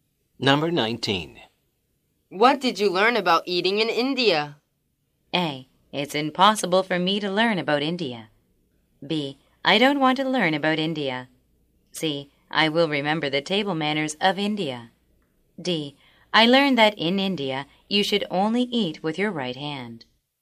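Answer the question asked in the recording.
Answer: D: I learned that in India, you should only eat with your right hand.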